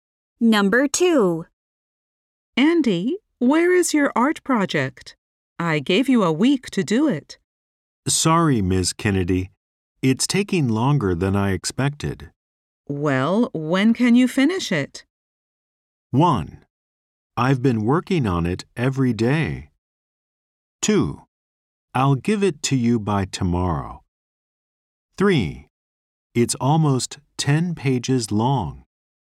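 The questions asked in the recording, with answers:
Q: Well, when can you finish it?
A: 2: I'll give it to you by tomorrow.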